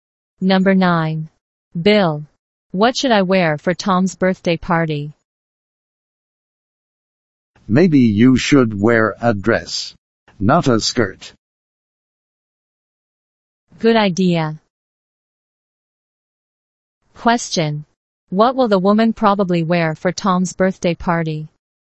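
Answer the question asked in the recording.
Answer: A dress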